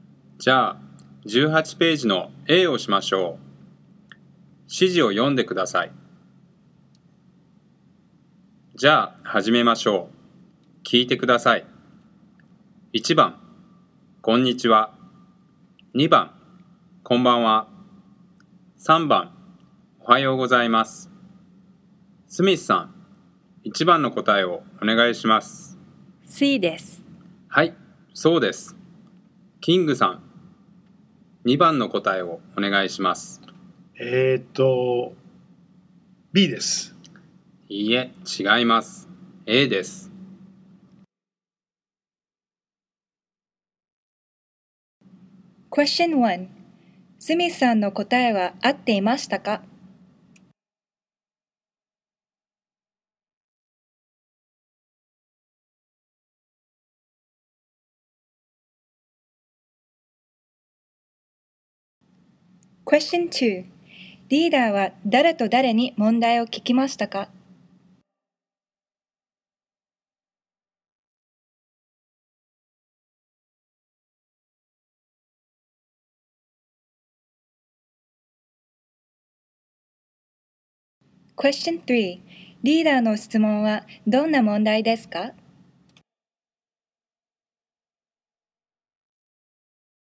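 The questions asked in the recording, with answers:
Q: スミスさんの答えは合っていましたか?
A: はい、合っていました。

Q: リーダーは誰と誰に問題を聞きましたか?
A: スミスさんとキングさん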